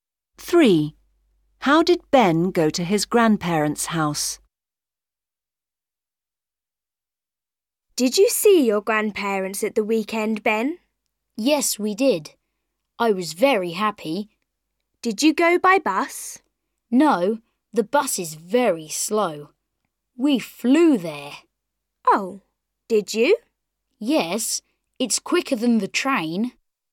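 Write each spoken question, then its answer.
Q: How did Ben go to his grandparents' house?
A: by plane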